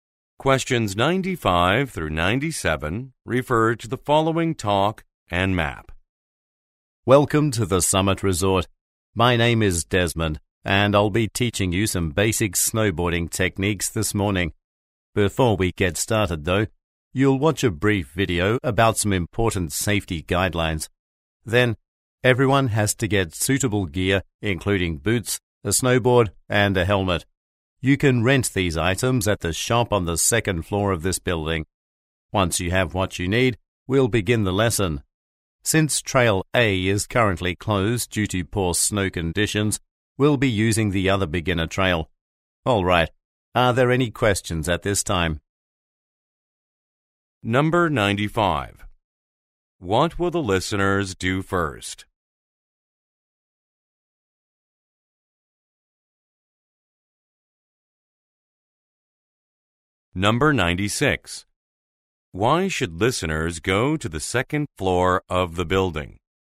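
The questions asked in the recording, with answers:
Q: What will the listeners do first?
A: Watch a safety video

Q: Why should listeners go to the second floor of the building?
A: To rent equipment (boots, snowboard, helmet)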